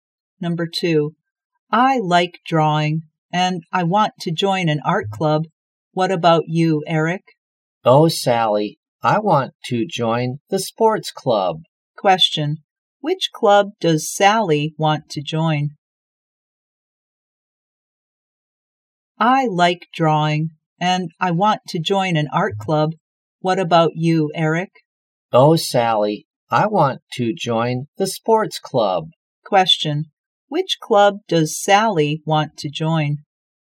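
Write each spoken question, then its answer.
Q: which club does Sally want to join?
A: The art club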